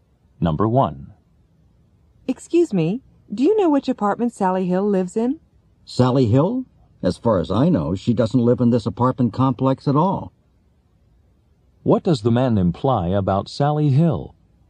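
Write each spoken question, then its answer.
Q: What does the man imply about Sally Hill?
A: She doesn't live in this apartment complex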